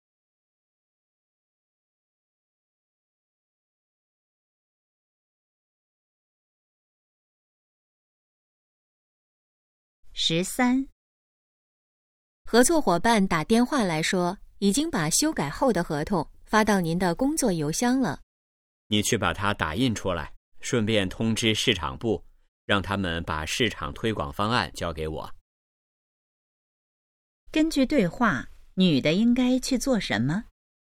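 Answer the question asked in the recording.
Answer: 打印合同,通知市场部交推广方案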